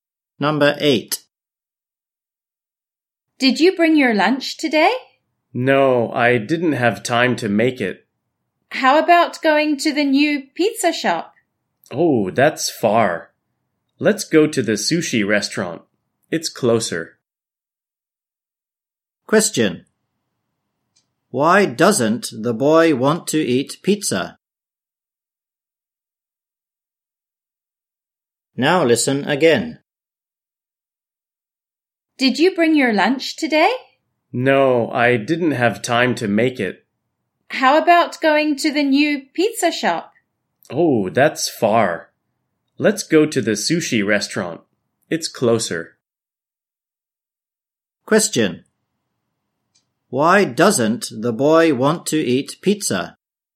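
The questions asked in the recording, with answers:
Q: Why doesn't the boy want to eat pizza?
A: The pizza shop is far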